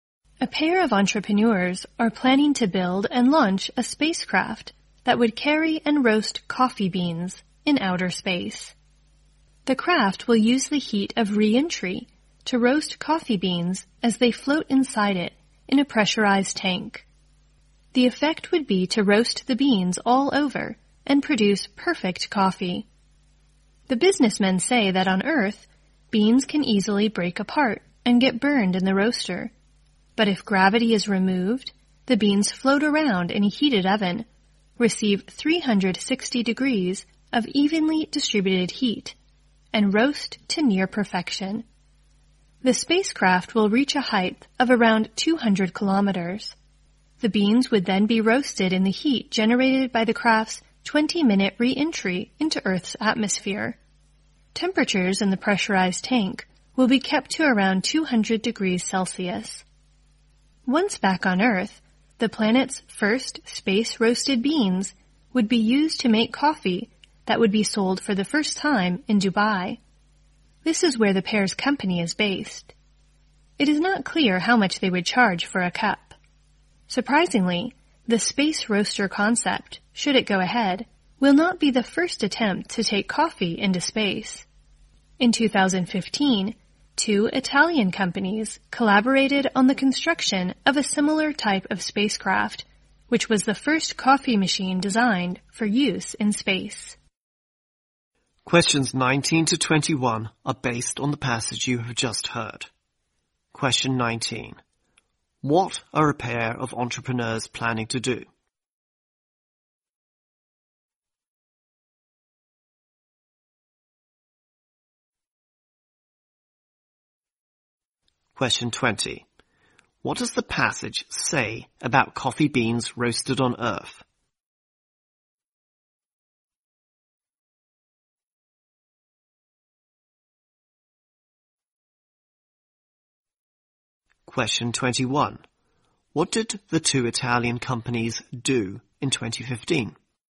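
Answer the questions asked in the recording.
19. Build and launch a spacecraft that roasts coffee beans in space
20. They can easily break apart and get burned in the roaster
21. They built the first coffee machine designed for use in space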